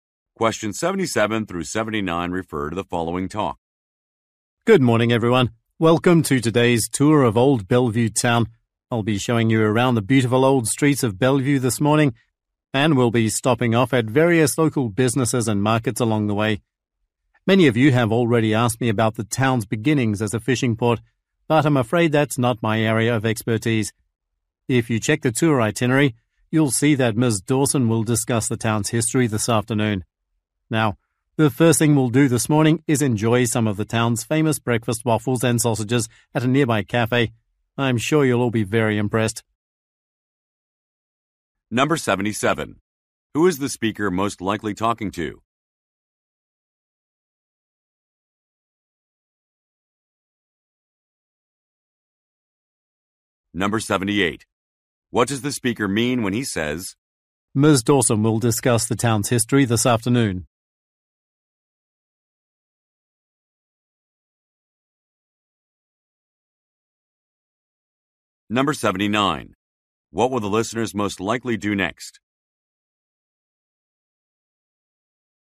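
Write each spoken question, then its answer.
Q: Who is the speaker most likely talking to?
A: Tourists on a town tour

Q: What will the listeners most likely do next?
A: Eat breakfast at a nearby cafe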